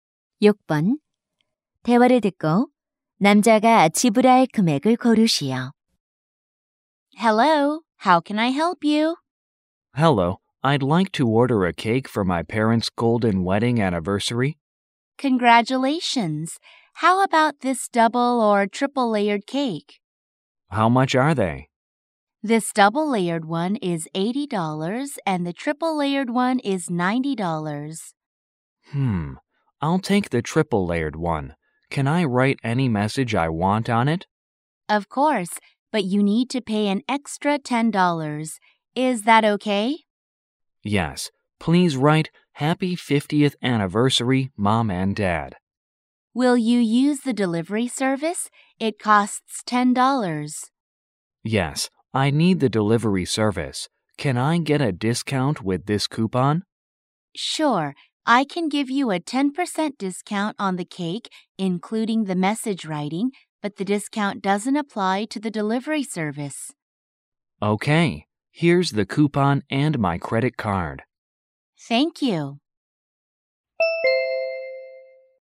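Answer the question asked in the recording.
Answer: 100달러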